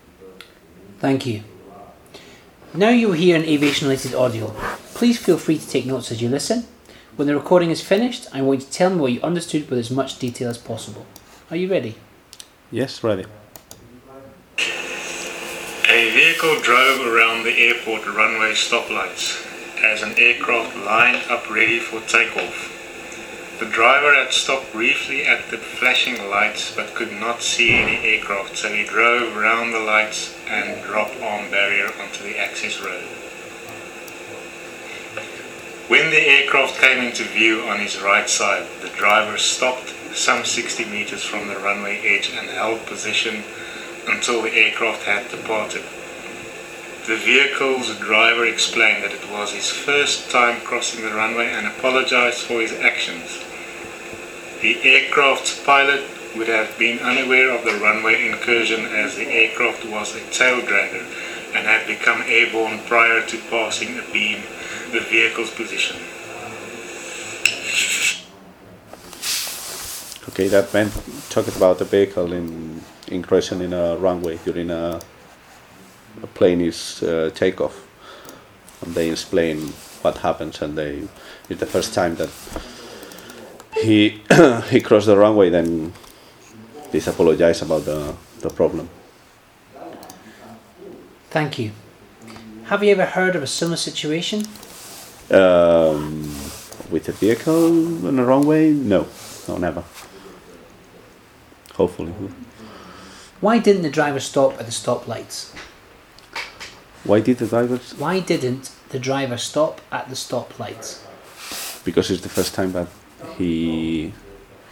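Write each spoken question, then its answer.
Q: Why didn't the driver stop at the stop lights?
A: He stopped briefly at the flashing lights but could not see any aircraft, so he drove around them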